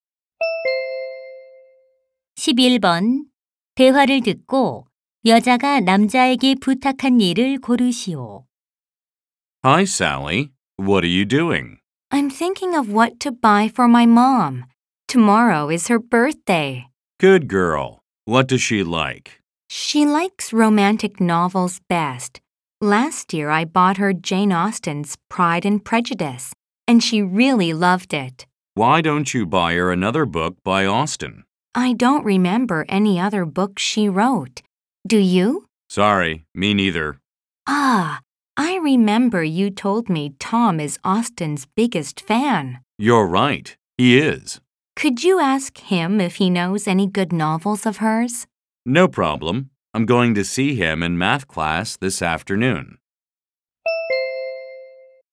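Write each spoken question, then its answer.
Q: 대화를 듣고 여자가 남자에게 부탁한 일을 고르시오.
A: Tom에게 오스틴의 좋은 소설을 물어봐 주기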